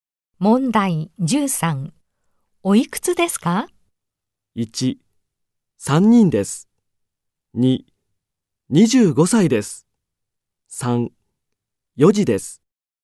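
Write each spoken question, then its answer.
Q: おいくつですか?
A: 2: 25歳です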